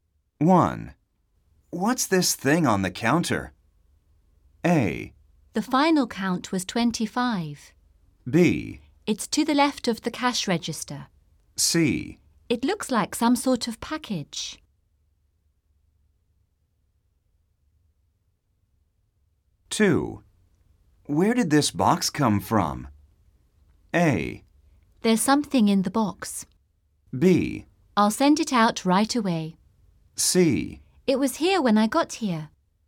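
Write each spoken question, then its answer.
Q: What's this thing on the counter?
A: C: It looks like some sort of package.

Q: Where did this box come from?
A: C: It was here when I got here.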